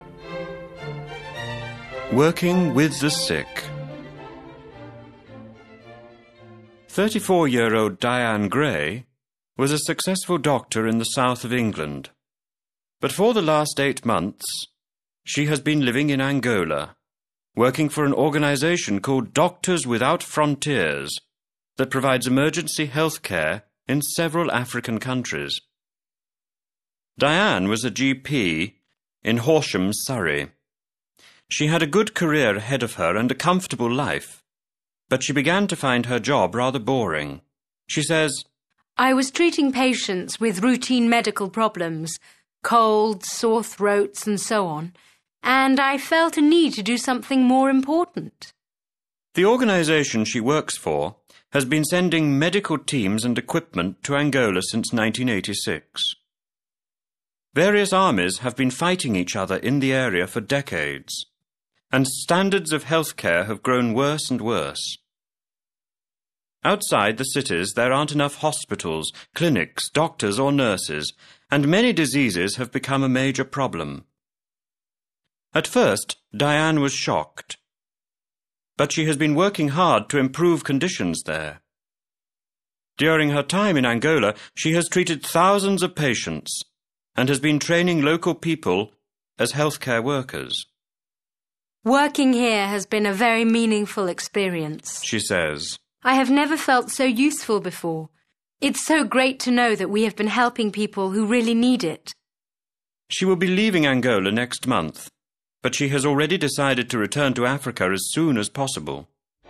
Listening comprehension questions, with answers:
1. Read the statements, then listen and mark them as T (true) or F (false).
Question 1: 34-year-old Dianne Grey was a successful actress.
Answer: F (false)

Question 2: She began to find her job rather boring.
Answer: T (true)

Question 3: "I was treating patients with routine medical problems."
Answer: T (true)

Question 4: Various armies have been fighting each other in the area for days.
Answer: F (false)

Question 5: she will be leaving Angola next year.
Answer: F (false)

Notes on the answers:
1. ... a successful doctor.
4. ... in the area for decades.
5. ... leaving Angola next month.

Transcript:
Working with the Sick
34-year-old Dianne Grey was a successful doctor in the south of England, but for the last eight months she has been living in Angola, working for an organisation called Doctor Without Frontiers that provides emergency health care in several African countries.
Dianne was a GP in Horsham, Surrey. She had a good career ahead of her and a comfortable life, but she began to find her job rather boring. She says, "I was treating patients with routine medical problems – colds, sore throats and so on – and I felt a need to do something more important."
The organisation she works for has been sending medical teams and equipment to Angola since 1986. Various armies have been fighting each other in the area for decades, and standards of health care have grown worse and worse. Outside the cities there aren't enough hospitals, clinics, doctors or nurses, and many diseases have become a major problem.
At first Dianne was shocked, but she has been working hard to improve conditions there. During her time in Angola, she has treated thousands of patients and has been training local people as health care workers.
"Working here has been a very meaningful experience," she says. "I have never felt so useful before. It's so great to know that we have been helping people who really need it." She will be leaving Angola next month, but she has already decided to return to Africa as soon as possible.